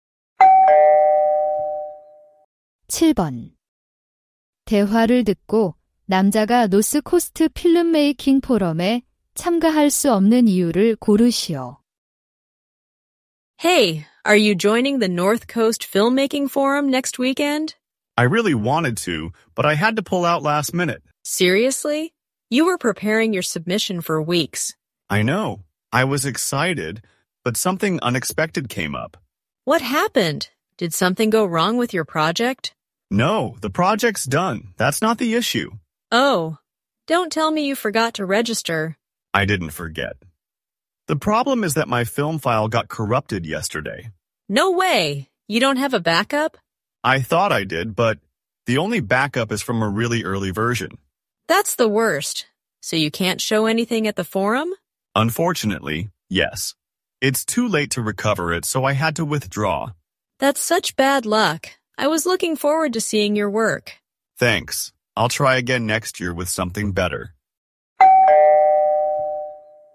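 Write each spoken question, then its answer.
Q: 대화를 듣고 남자가 노스코스트 필름메이킹 포럼에 참가할 수 없는 이유를 고르시오.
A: 영화 파일이 손상되어서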